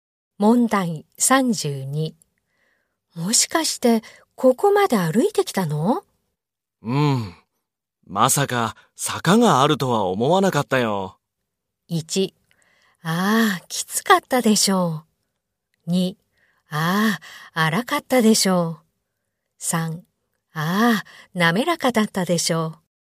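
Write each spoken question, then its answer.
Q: もしかして、ここまで歩いてきたの?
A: 1: ああ、きつかったでしょう。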